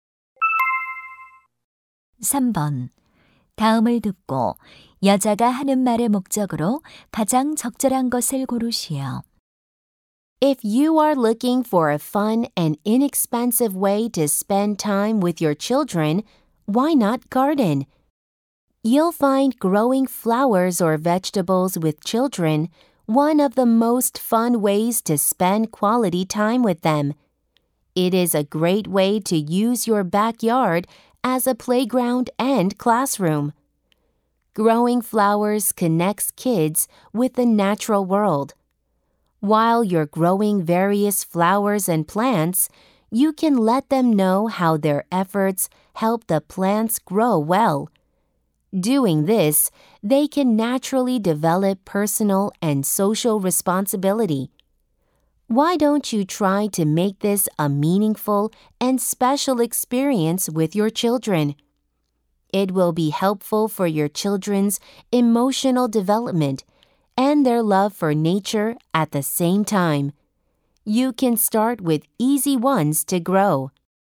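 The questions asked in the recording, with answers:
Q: 다음을 듣고 여자가 하는 말의 목적으로 가장 적절한 것을 고르시오.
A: 아이들과 함께 정원 가꾸기를 권장하려고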